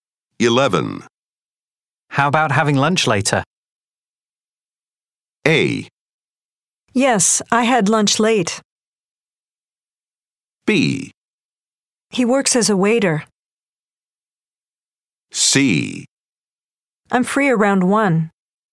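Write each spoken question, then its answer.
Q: How about having lunch later?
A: C: I'm free around 1.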